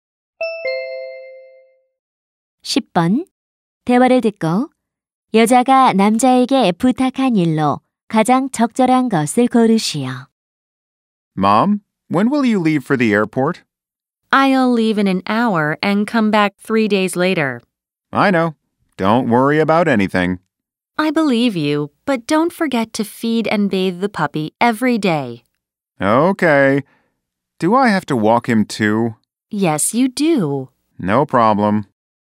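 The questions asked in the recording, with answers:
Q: 대화를 듣고 여자가 남자에게 부탁한 일로 가장 적절한 것을 고르시오.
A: 강아지에게 먹이 주고 목욕시키기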